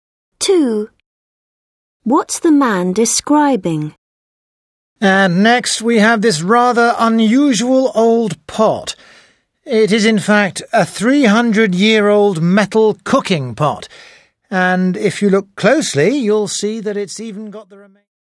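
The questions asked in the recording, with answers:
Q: What's the man describing?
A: A 300-year-old metal cooking pot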